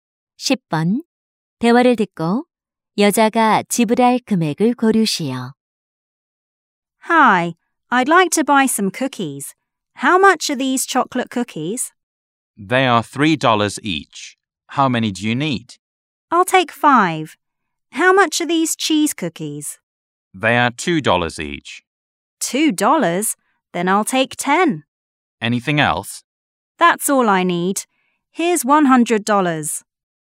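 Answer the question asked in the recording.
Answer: 35달러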